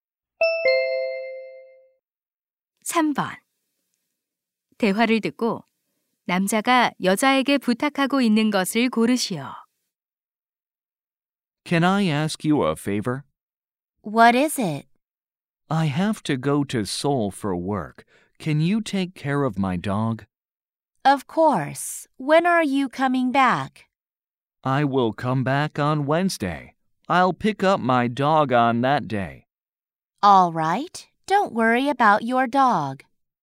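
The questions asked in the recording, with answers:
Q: 대화를 듣고 남자가 여자에게 부탁하고 있는 것을 고르시오.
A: 개 돌봐 주기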